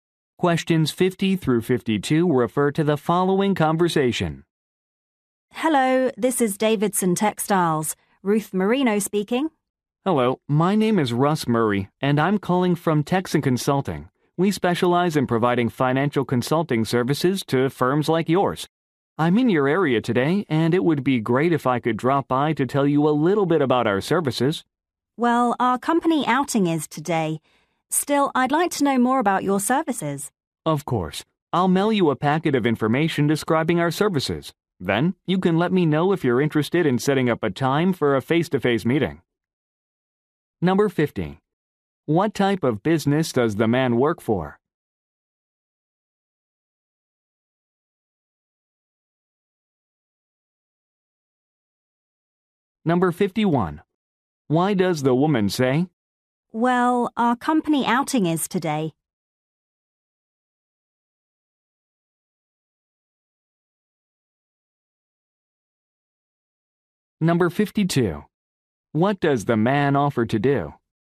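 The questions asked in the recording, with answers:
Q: What type of business does the man work for?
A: A financial consulting firm

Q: What does the man offer to do?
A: Mail a packet of information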